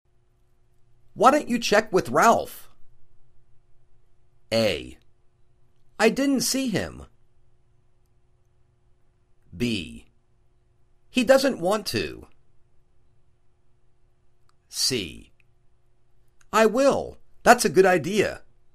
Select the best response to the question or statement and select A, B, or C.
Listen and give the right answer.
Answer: I will. That's a good idea.